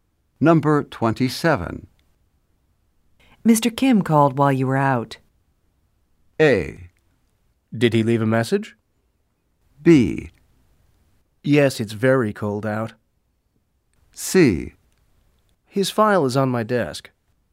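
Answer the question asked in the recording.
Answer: A: Did he leave a message?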